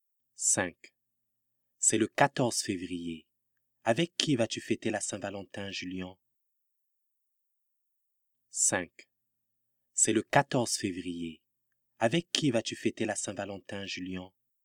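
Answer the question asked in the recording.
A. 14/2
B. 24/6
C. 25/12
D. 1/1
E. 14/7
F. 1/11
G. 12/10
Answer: A. 14/2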